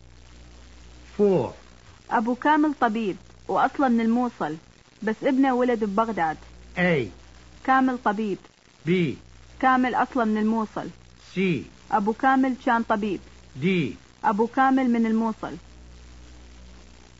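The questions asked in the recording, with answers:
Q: ابو كامل طبيب واصلا من الموصل بس ابنه ولد ببغداد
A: D: ابو كامل من الموصل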